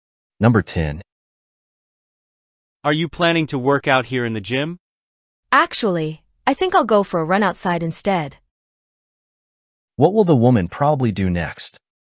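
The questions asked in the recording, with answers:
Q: What will the woman probably do next?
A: Go for a run outside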